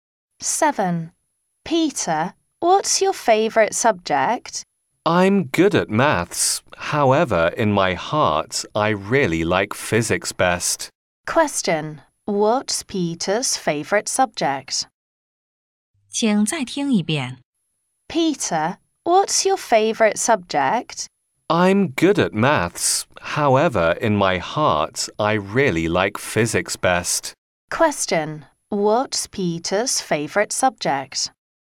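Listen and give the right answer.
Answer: Physics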